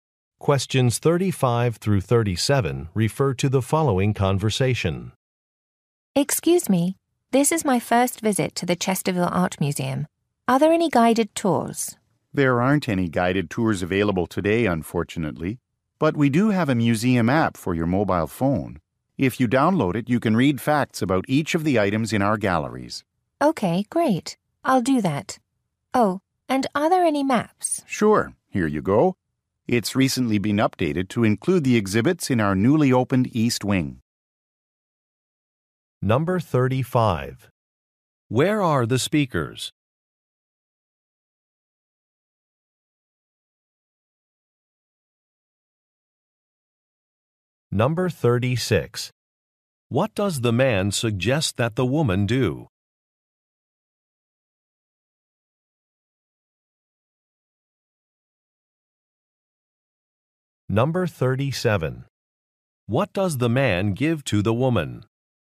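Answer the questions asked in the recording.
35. At an art museum
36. Download the museum app
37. A map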